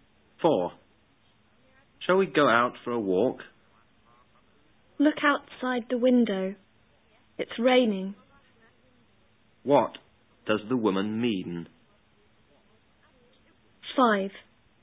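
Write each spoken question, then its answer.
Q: What does the woman mean?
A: They can't go for a walk because it's raining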